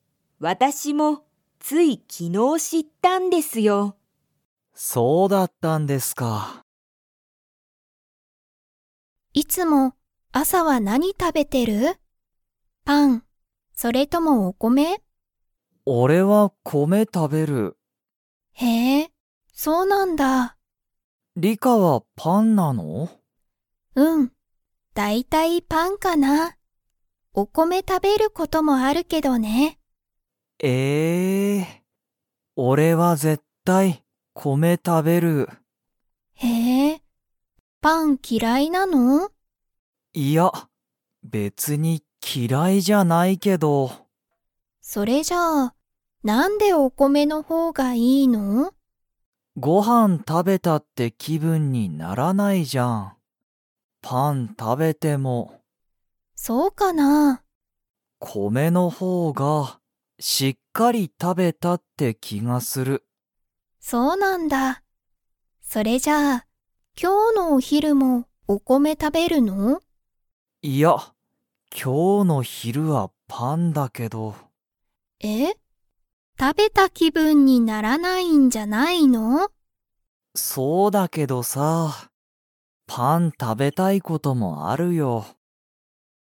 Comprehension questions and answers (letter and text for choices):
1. ナオキは、パンが嫌きらいですか?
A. はい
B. いいえ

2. ナオキは今日きょうの昼ひる、 を食たべる。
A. お米こめ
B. パン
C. パスタ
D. ラーメン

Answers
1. B. いいえ
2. B. パン

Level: Level 4